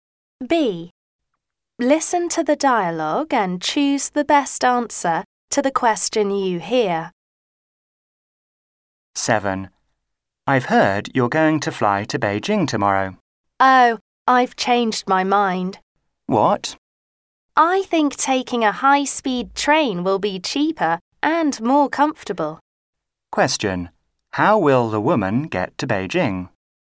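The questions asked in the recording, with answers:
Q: How will the woman get to Beijing?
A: By high-speed train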